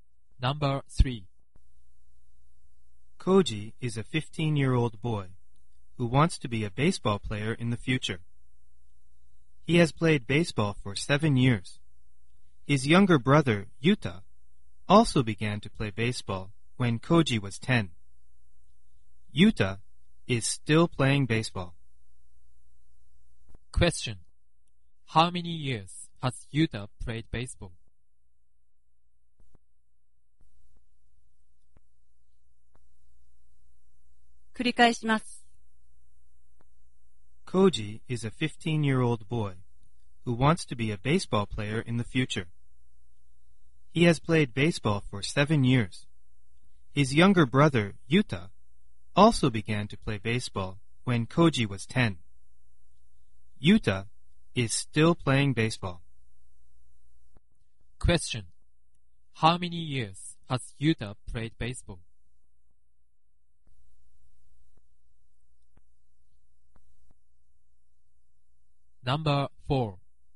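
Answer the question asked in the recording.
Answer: Five years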